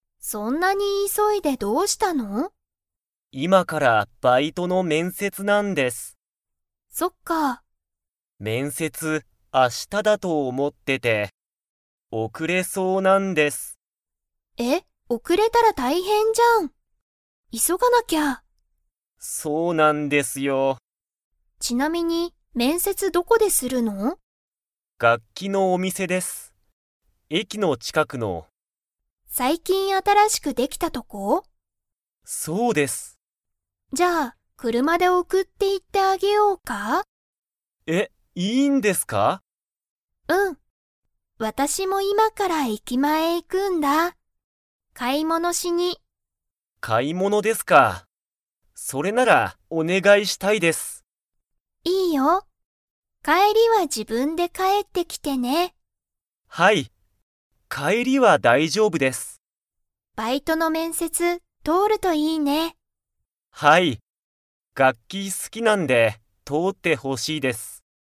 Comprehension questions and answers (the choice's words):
Comprehension Quiz (Skip if you don't understand the conversation yet)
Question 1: ゆうきは、面接めんせつが だ思おもっていた。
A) 昨日きのう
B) 今日きょう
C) 明日あした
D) 毎日まいにち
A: 明日あした

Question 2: さゆりは今いまから駅前えきまえに行いきますか?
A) はい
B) いいえ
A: はい

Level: Level 4